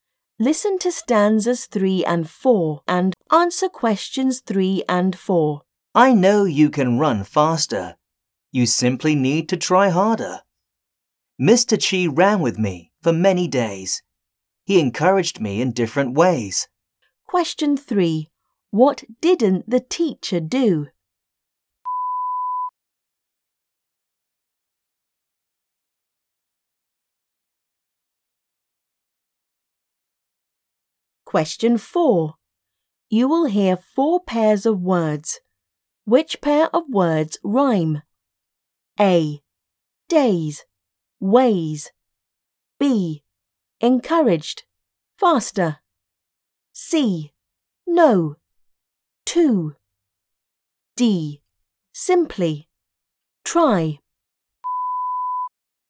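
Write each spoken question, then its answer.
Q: Which pair of words rhyme?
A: A: Days. Ways.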